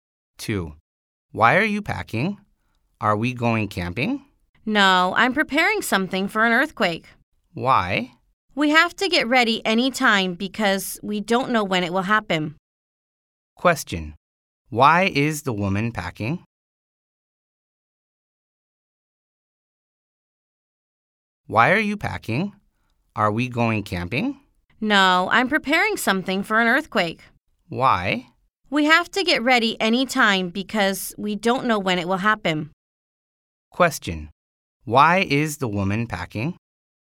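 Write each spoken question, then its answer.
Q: Why is the woman packing?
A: She is preparing things for an earthquake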